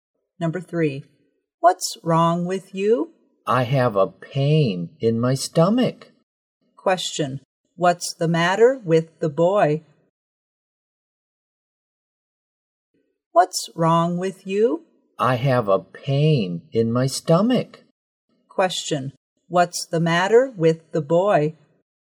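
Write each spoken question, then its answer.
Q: Question, what's the matter with the boy?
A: He has a stomachache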